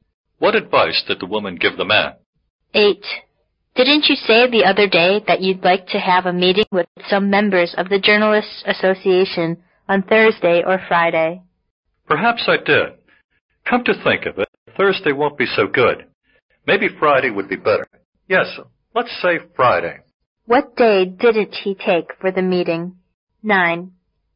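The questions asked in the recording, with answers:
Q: What day didn't he take for the meeting?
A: Thursday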